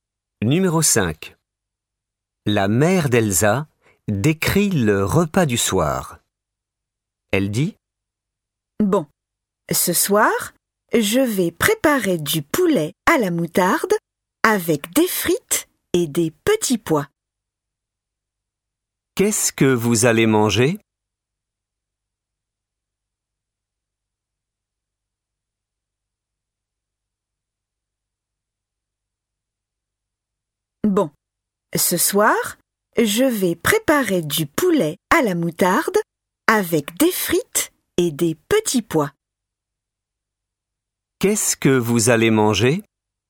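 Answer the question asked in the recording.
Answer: Du poulet à la moutarde avec des frites et des petits pois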